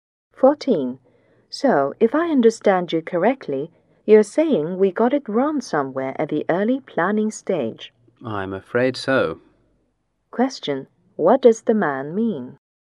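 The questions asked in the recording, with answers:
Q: What does the man mean?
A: They made a mistake at the early planning stage.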